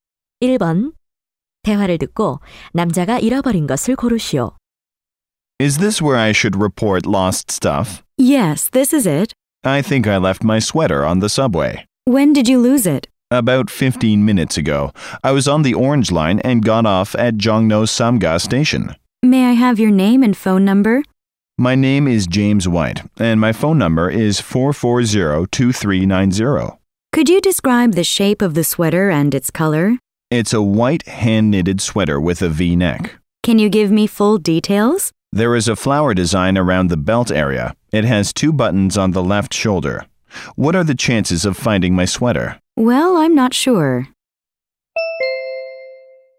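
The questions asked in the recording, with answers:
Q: 대화를 듣고 남자가 잃어버린 것을 고르시오.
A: 스웨터 (흰색 손뜨개 V넥 스웨터)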